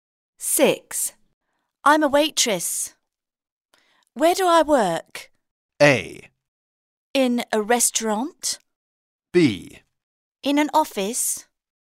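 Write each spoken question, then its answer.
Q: I'm a waitress. Where do I work?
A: A: In a restaurant.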